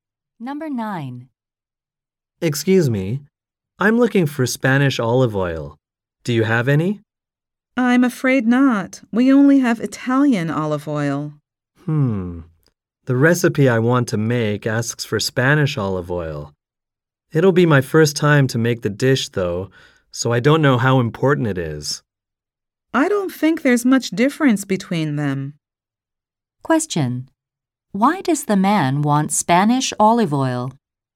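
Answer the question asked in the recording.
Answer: His recipe calls for it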